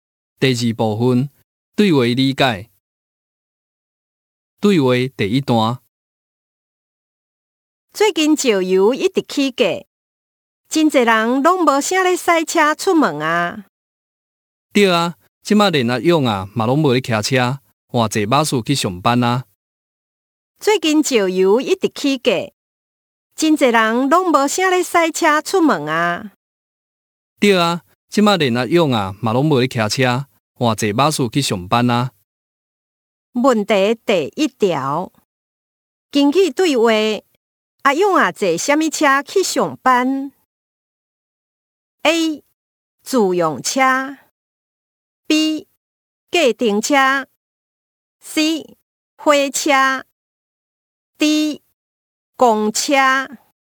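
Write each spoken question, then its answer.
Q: 根据对话,阿勇啊坐什么车去上班?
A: D: 公车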